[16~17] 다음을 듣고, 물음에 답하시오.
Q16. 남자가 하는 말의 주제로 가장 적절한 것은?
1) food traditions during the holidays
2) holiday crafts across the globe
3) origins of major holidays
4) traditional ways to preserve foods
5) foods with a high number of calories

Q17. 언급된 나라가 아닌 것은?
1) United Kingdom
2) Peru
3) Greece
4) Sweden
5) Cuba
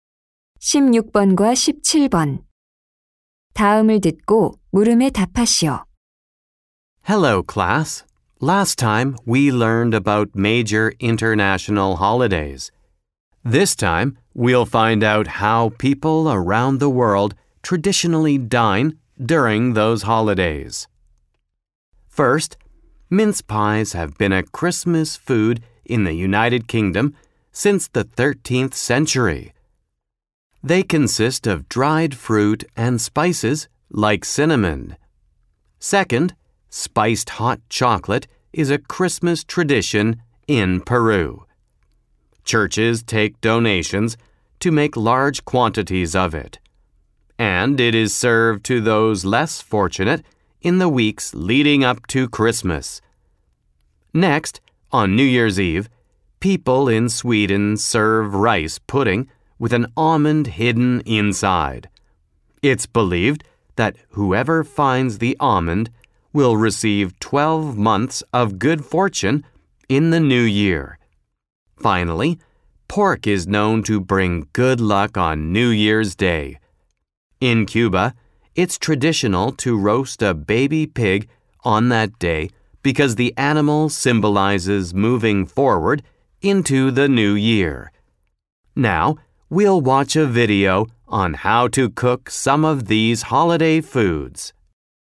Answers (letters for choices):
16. 1
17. 3

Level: 고3